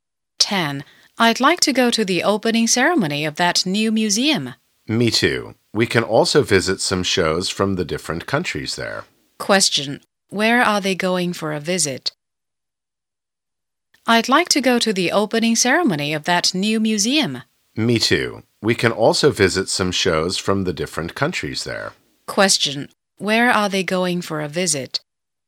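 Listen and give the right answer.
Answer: The new museum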